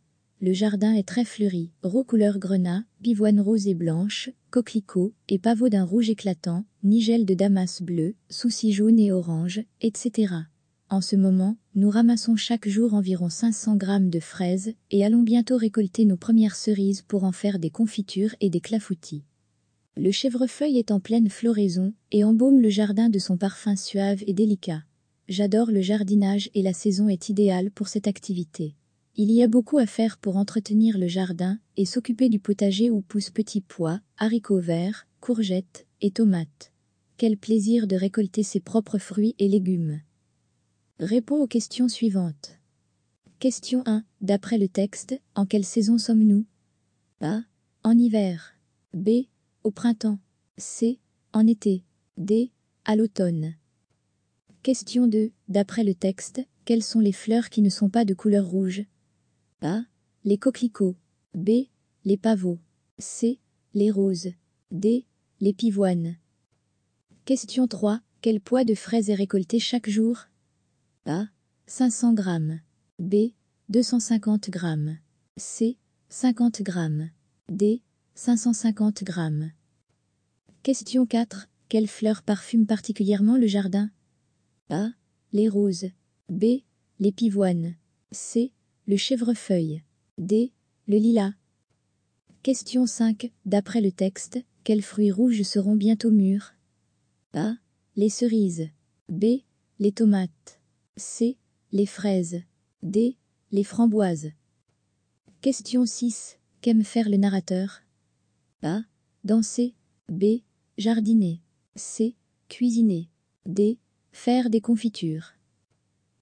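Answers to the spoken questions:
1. B: Au printemps
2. D: Les pivoines
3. A: 500 grammes
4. C: Le chèvrefeuille
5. A: Les cerises
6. B: Jardiner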